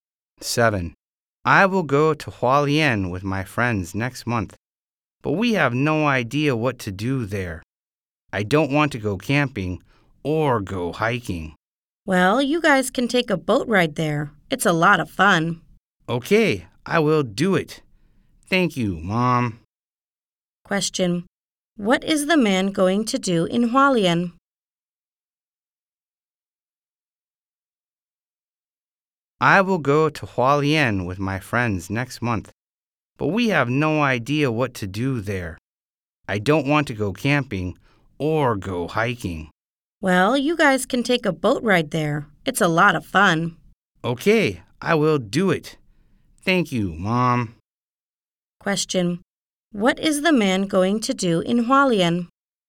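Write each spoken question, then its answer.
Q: What is the man going to do in Hualien?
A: Take a boat ride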